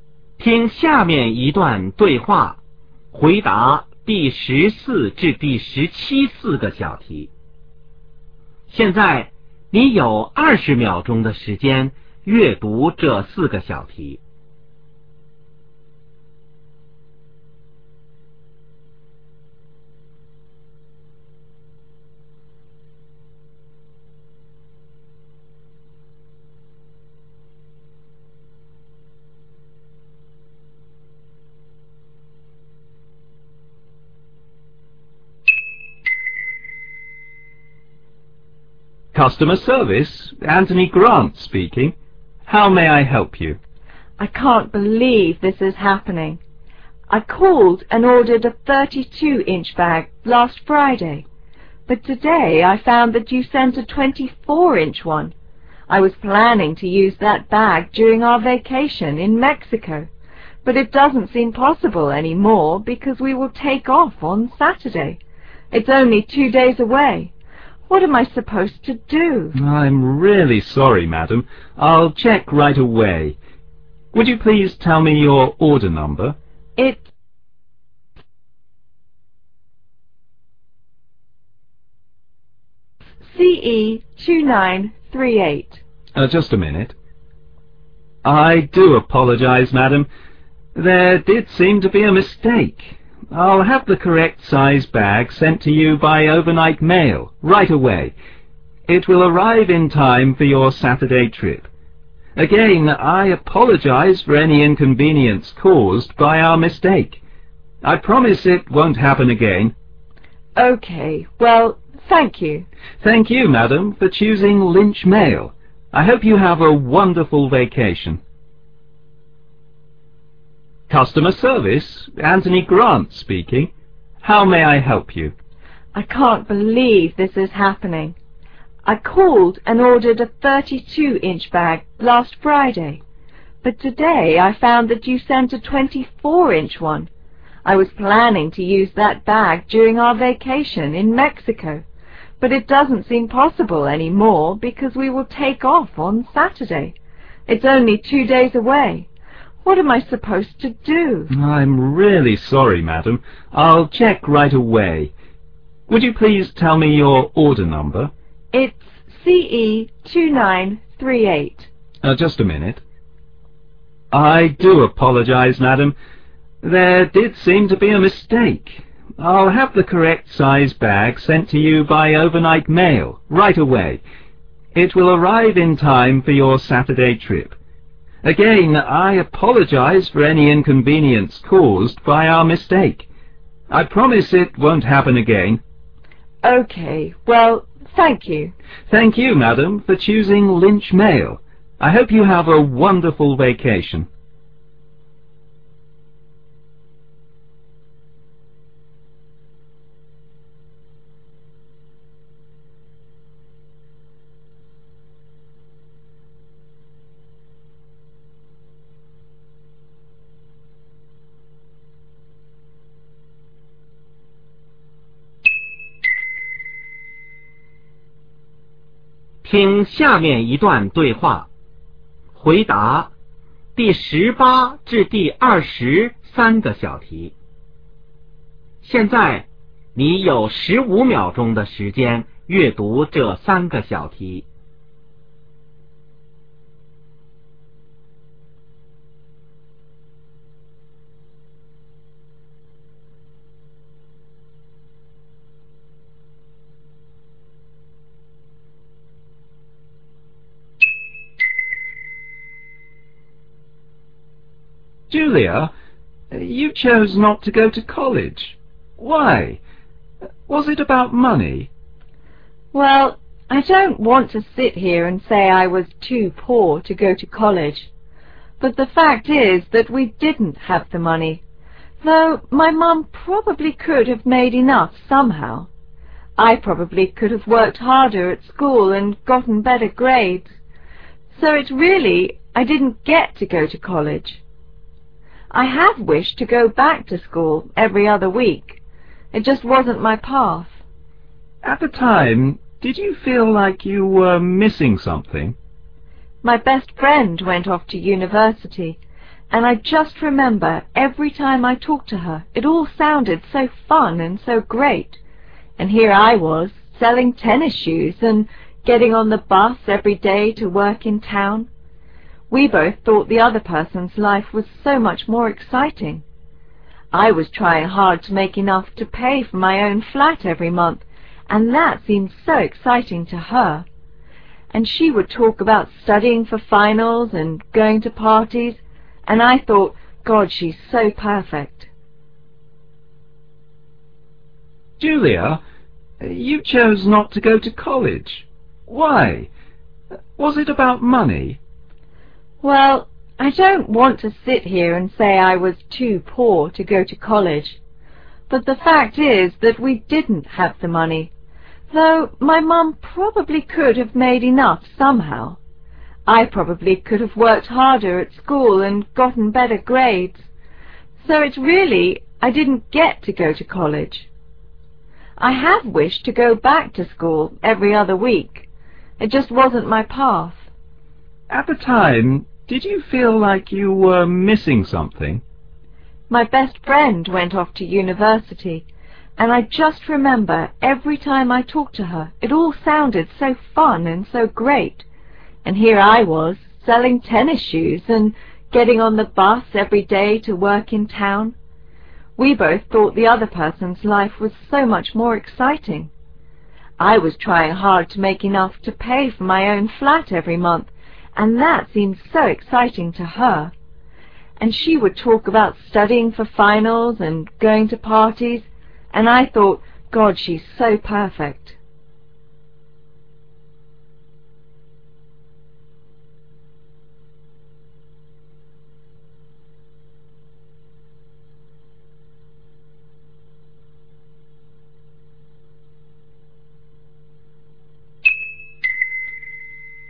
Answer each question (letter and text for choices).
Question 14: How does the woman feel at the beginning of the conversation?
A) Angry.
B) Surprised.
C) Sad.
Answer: A) Angry.

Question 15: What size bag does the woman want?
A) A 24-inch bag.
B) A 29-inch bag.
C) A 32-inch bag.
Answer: C) A 32-inch bag.

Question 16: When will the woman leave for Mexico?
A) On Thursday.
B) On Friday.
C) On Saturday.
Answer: C) On Saturday.

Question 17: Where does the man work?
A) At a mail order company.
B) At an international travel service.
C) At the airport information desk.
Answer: A) At a mail order company.

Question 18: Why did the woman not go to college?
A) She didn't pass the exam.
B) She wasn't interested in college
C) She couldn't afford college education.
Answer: C) She couldn't afford college education.

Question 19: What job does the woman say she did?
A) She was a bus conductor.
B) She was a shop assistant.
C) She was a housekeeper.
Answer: B) She was a shop assistant.

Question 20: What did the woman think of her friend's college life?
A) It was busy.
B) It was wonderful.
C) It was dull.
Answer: B) It was wonderful.